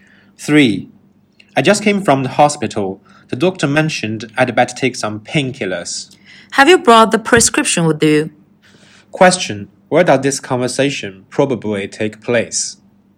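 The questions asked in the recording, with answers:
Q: Where does this conversation probably take place?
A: At a pharmacy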